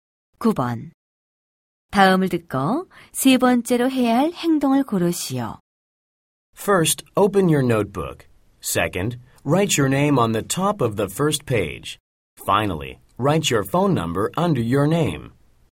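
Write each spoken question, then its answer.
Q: 다음을 듣고 세 번째로 해야 할 행동을 고르시오.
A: 이름 아래에 전화번호 쓰기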